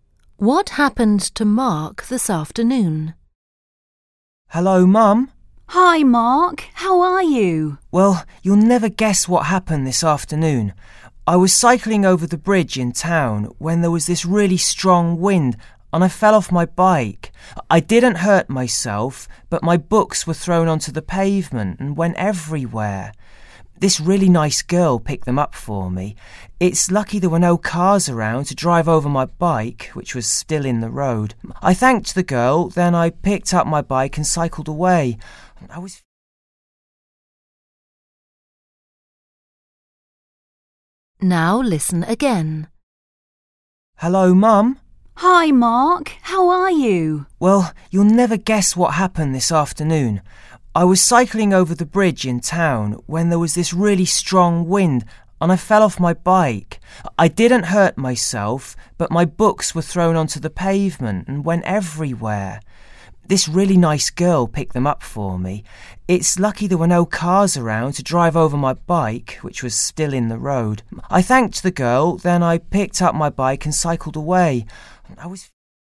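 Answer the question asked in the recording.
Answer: He fell off his bike in the wind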